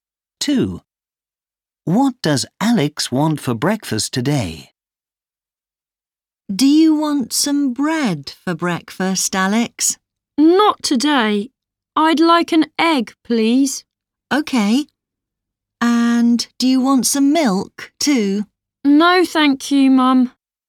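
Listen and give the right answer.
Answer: an egg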